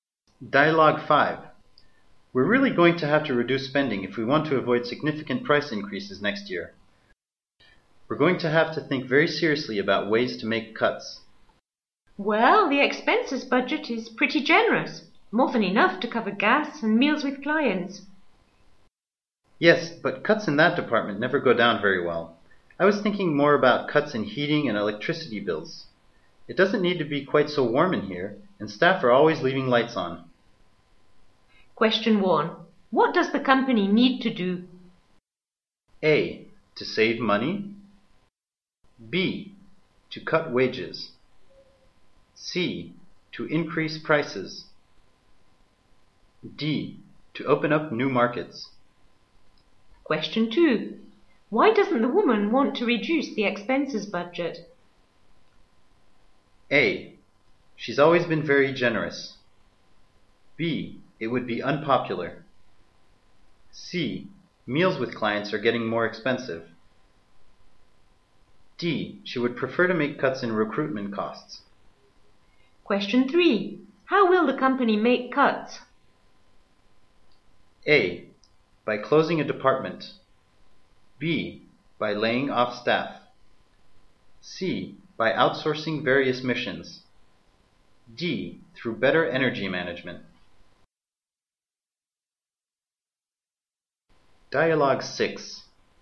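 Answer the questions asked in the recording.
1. A: To save money.
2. B: It would be unpopular.
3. D: Through better energy management.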